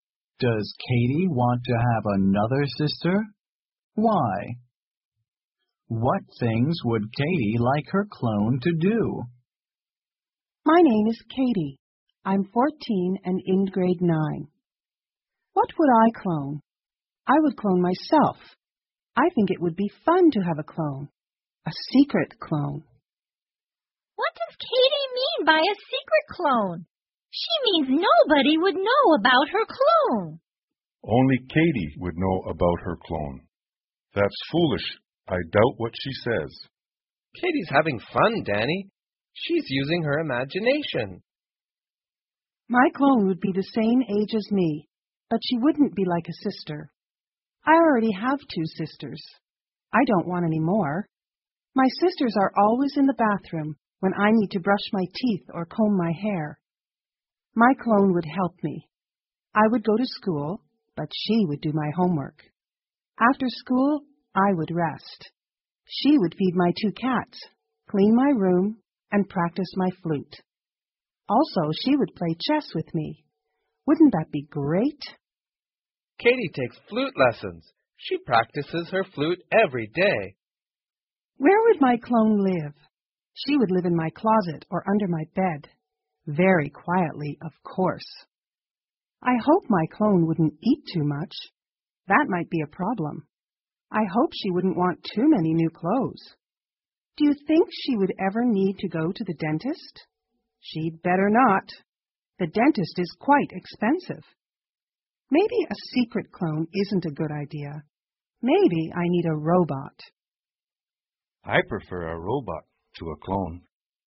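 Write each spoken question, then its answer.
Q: Does Katie want to have another sister?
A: No

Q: What things would Katie like her clone to do?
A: Do her homework, feed her two cats, clean her room, practice her flute and play chess with her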